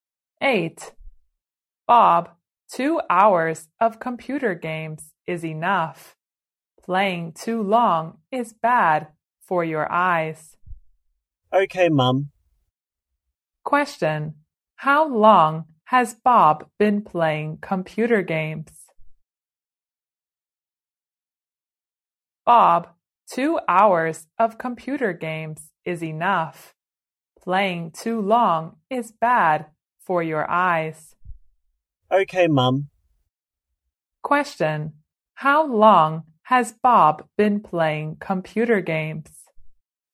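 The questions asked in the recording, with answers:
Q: How long has Bob been playing computer games?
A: For 2 hours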